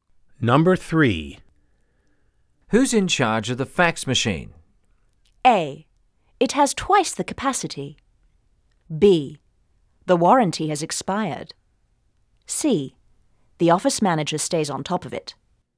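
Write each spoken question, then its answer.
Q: Who's in charge of the fax machine?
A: C: The office manager stays on top of it.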